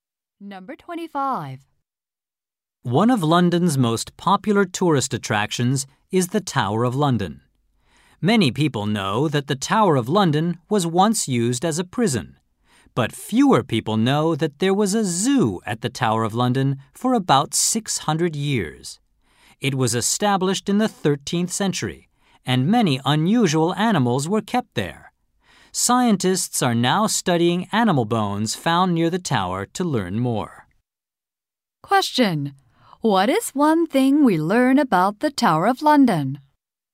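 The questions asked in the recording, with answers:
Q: What is one thing we learn about the Tower of London?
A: There was a zoo there for about 600 years.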